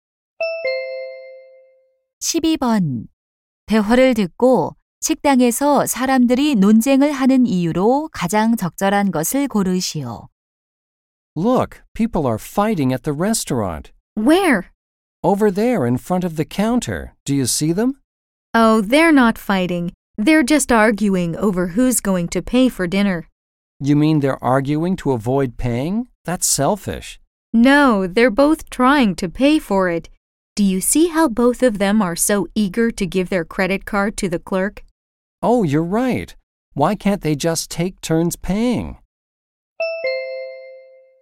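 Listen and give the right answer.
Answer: 서로 저녁값을 내려고 해서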